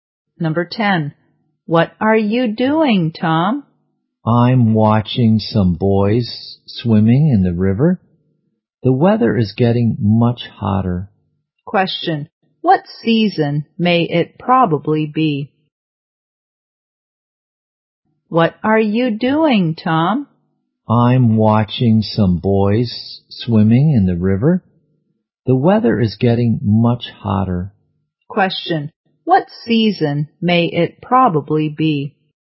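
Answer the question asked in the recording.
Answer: Summer.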